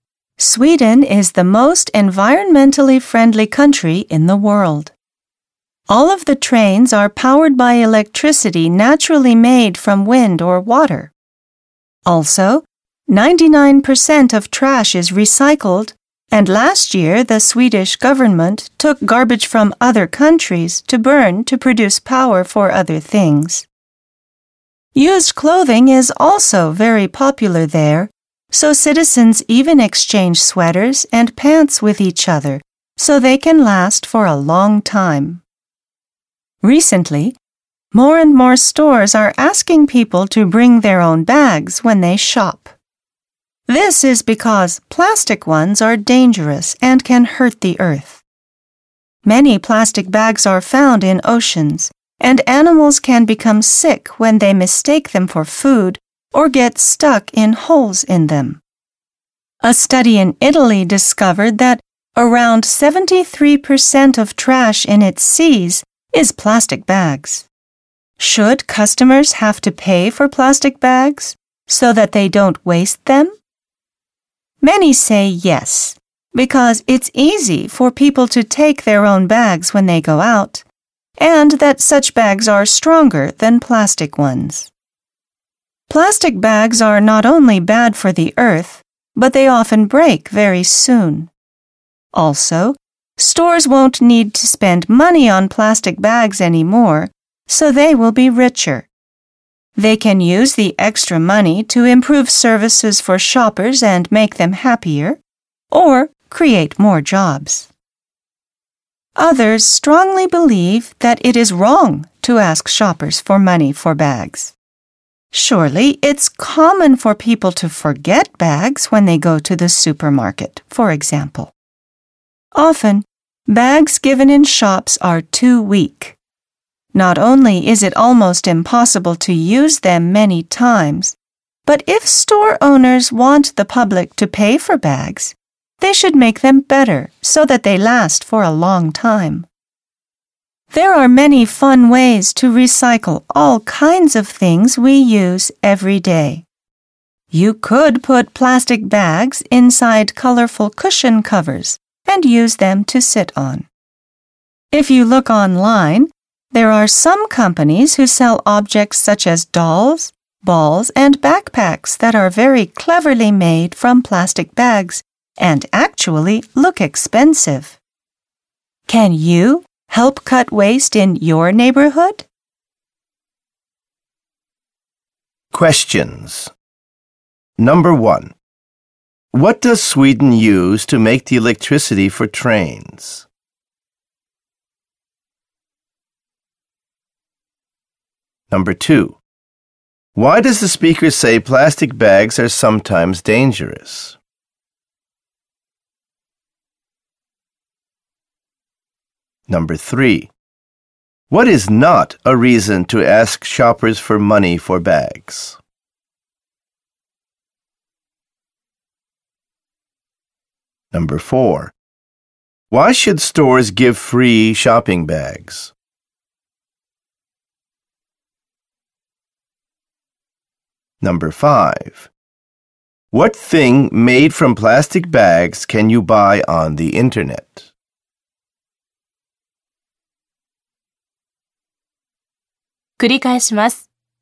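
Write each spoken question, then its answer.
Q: What does Sweden use to make the electricity for trains?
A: Wind or water

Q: Why does the speaker say plastic bags are sometimes dangerous?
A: Animals can get sick when they mistake them for food or get stuck in them

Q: What thing made from plastic bags can you buy on the internet?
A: Dolls, balls and backpacks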